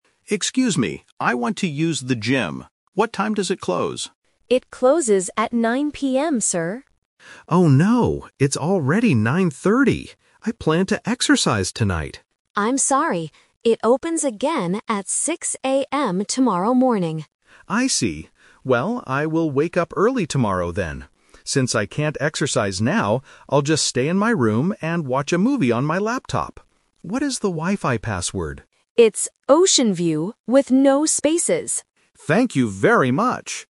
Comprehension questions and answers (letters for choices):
Listen to a conversation between a hotel guest and a receptionist. Choose the correct answer (A, B, or C) for each question.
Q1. What time does the hotel gym close?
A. At 6:00 AM.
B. At 9:00 PM.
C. At 9:30 PM.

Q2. What is the guest's new plan for tonight? (The Twist)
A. To exercise in the gym.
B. To go to sleep early.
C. To watch a movie on his laptop.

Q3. What information does the guest ask for at the end?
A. The Wi-Fi password.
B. His room number.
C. A new laptop.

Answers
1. B
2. C
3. A

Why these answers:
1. The receptionist clearly states the closing time: "It closes at 9:00 PM, sir." Trap: Option A is a trap because 6:00 AM is the opening time for tomorrow. Option C is a trap because 9:30 is the current time, not the gym's closing time.
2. This is the Twist. The guest originally wanted to exercise, but because the gym is closed, he changes his plan. He says, "...I'll just stay in my room and watch a movie on my laptop." Trap: Option A is what he planned to do at first, but he can't do it. Option B is a plausible thing to do if you plan to wake up early (at 6:00 AM), but he does not mention going to sleep early.
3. At the end of the conversation, the guest asks, "What is the Wi-Fi password?" Trap: Option C is a trap because he mentions his "laptop", but he already has one; he doesn't ask the receptionist for a new one. Option B is a common thing to ask at a hotel but is never mentioned here.

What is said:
Guest: Excuse me. I want to use the gym. What time does it close?
Receptionist: It closes at 9:00 PM, sir.
Guest: Oh no, it's already 9:30. I planned to exercise tonight.
Receptionist: I'm sorry. It opens again at 6:00 AM tomorrow morning.
Guest: I see. Well, I will wake up early tomorrow then. Since I can't exercise now, I'll just stay in my room and watch a movie on my laptop. What is the Wi-Fi password?